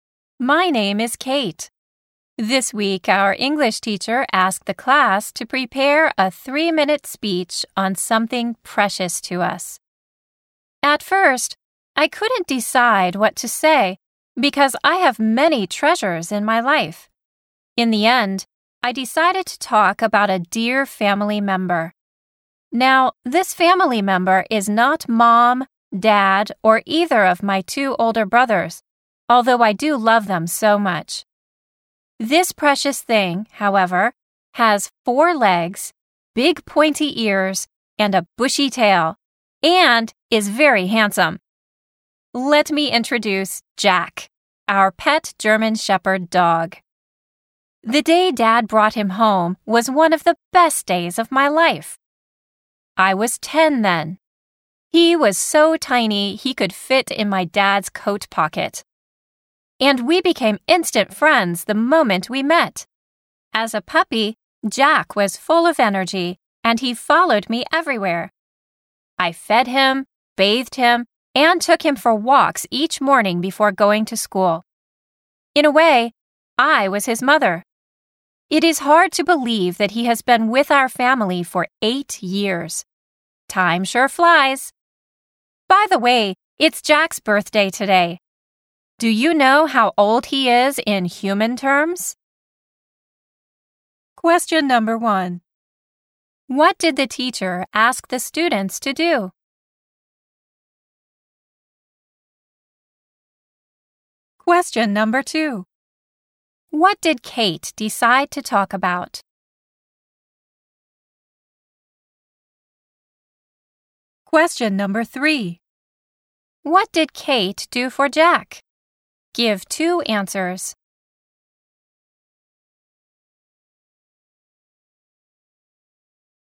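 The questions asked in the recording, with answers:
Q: What did the teacher ask the students to do?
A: To prepare a 3-minute speech on something precious to them.

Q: What did Kate decide to talk about?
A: Her pet dog Jack, a German Shepherd.

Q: What did Kate do for Jack? Give two answers.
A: She fed him, bathed him, and took him for walks each morning.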